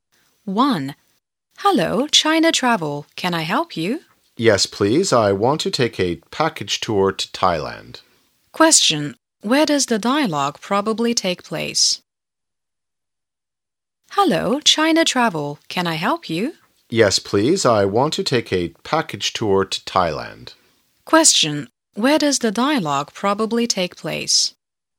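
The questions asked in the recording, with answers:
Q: Where does the dialogue probably take place?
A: At a travel agency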